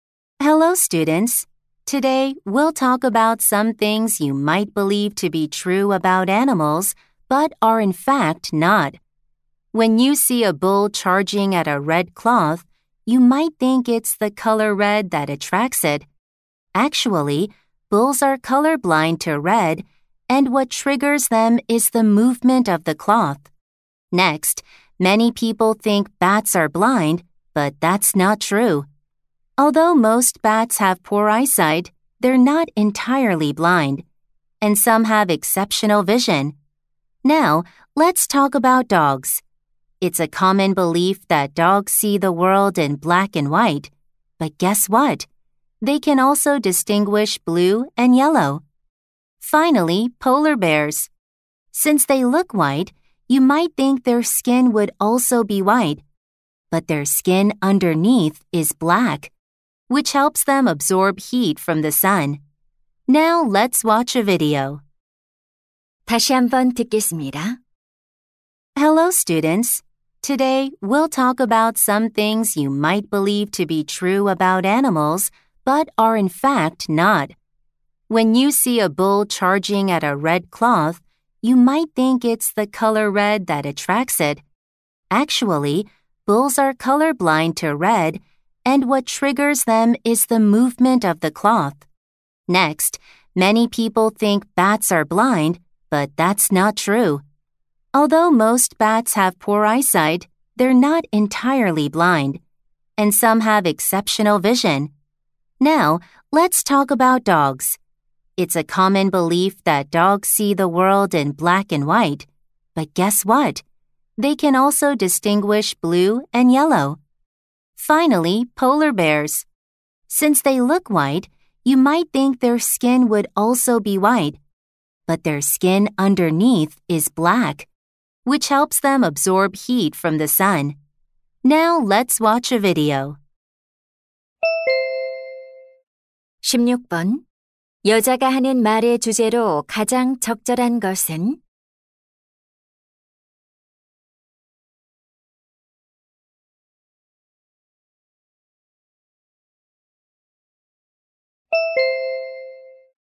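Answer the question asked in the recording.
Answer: 동물에 관한 잘못된 통념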